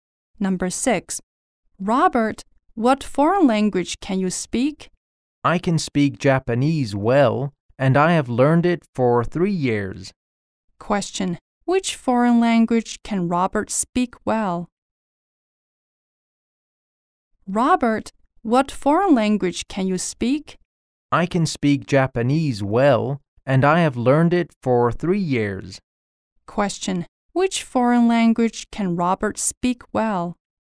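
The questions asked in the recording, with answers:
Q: Which foreign language can Robert speak well?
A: Japanese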